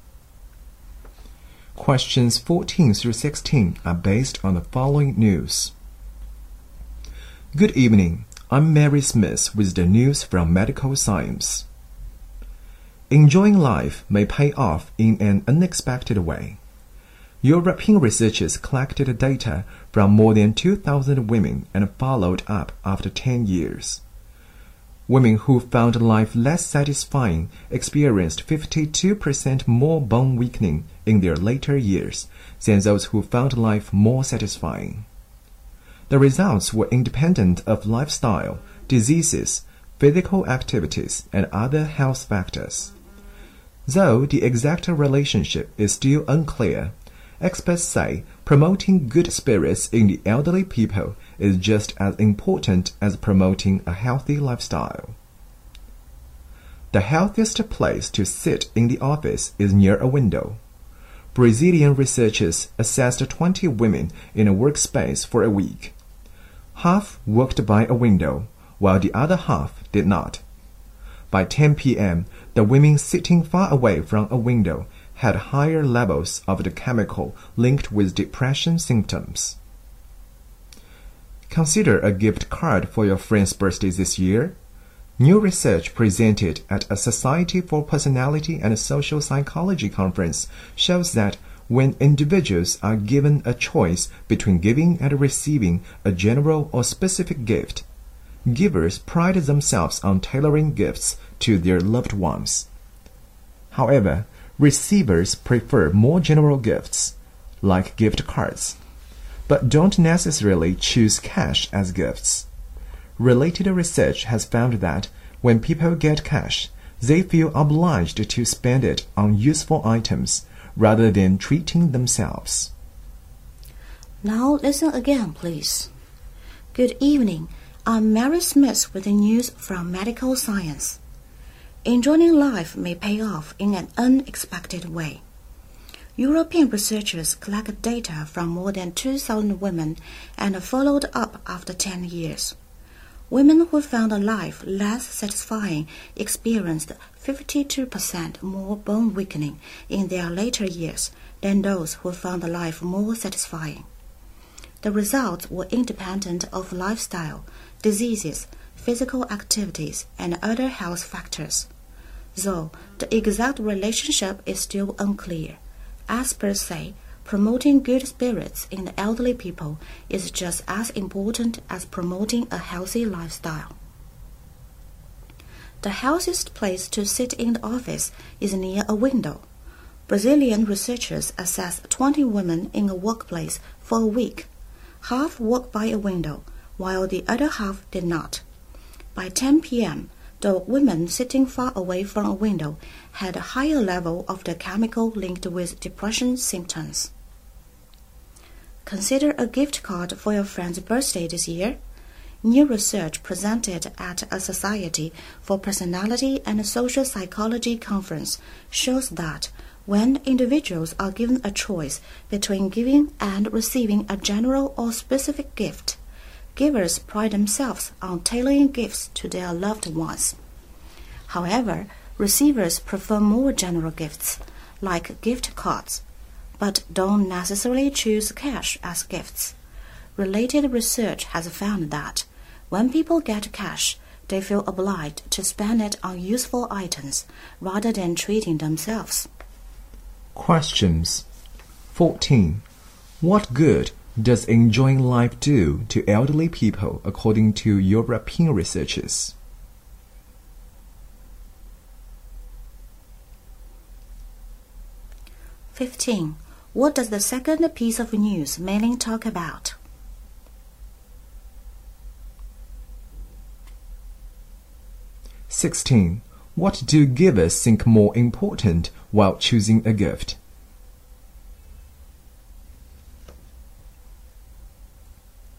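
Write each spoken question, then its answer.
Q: What good does enjoying life do to elderly people according to European researchers?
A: Less bone weakening

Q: What does the second piece of news mainly talk about?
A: Sitting near a window is healthiest in the office

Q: What do givers think more important while choosing a gift?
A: Tailoring gifts to the receiver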